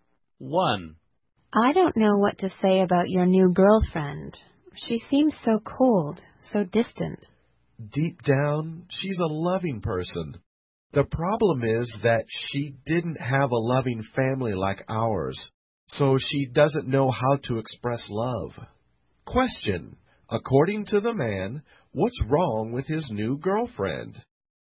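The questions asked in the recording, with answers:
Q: According to the man, what's wrong with his new girlfriend?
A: She doesn't know how to express love because she didn't have a loving family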